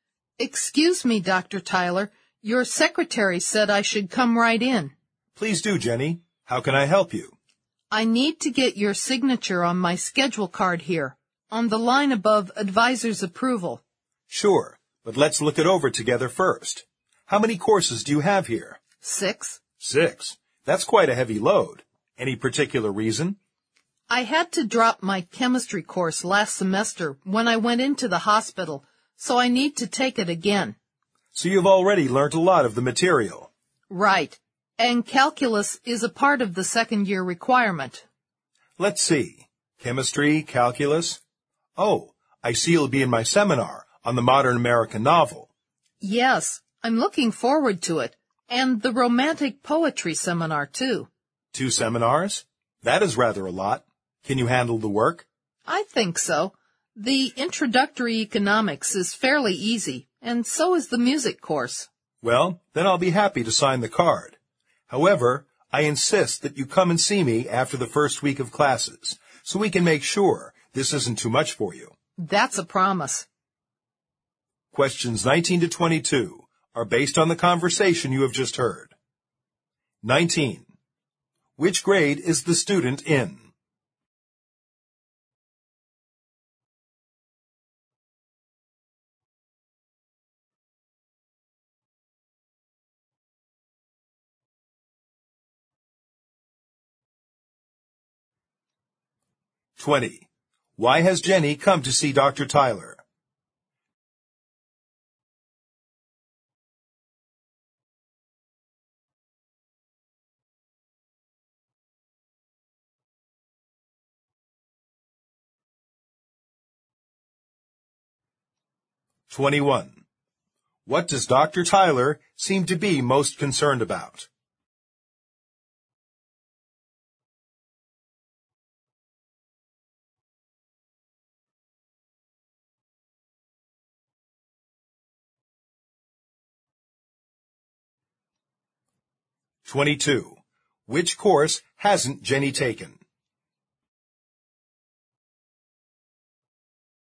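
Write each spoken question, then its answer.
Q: What does Dr. Tyler seem to be most concerned about?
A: Whether she can handle the heavy course load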